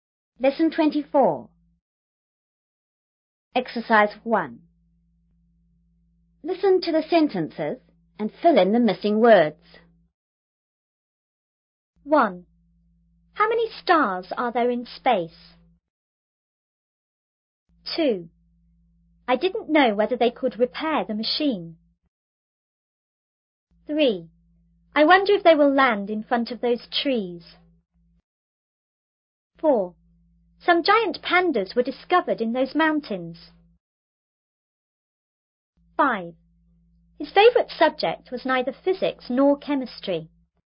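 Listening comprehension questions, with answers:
1.Listen to the sentences and fill in the missing word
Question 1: How many _____ are there in ____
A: stars; space

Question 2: I didn't know ______ they could ______ the machin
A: whether; repair

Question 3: I _______ if they will _______ in front of those tree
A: wonder; land

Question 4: Some ______ pandas were ______ in those mountain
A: giant; discovered

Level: 5B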